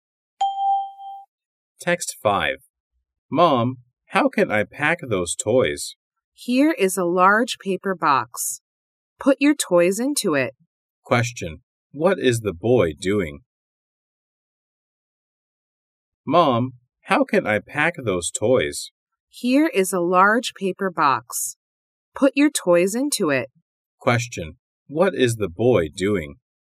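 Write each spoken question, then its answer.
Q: What is the boy doing?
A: Packing his toys.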